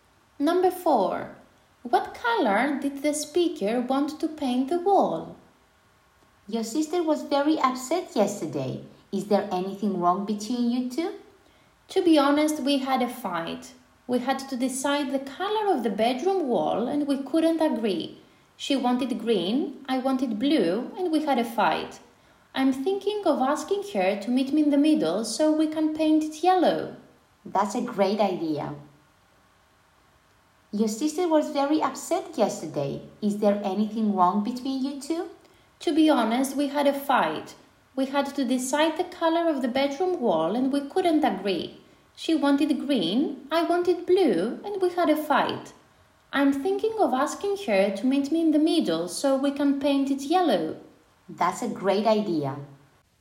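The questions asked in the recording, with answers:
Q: What color did the speaker want to paint the wall?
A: Blue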